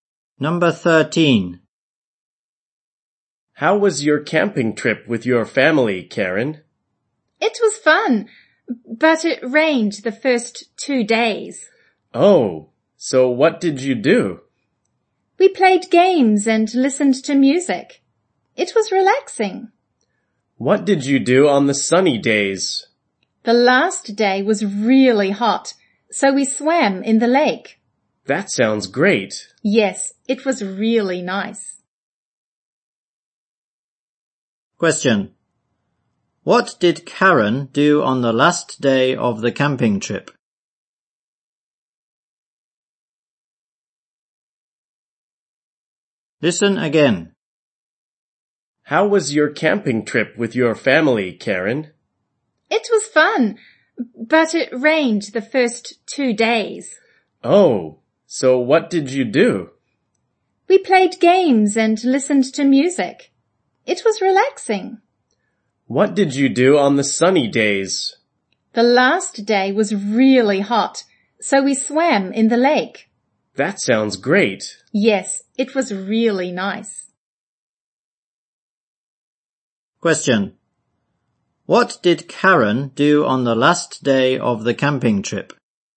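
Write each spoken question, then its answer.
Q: What did Karen do on the last day of the camping trip?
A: She swam in the lake.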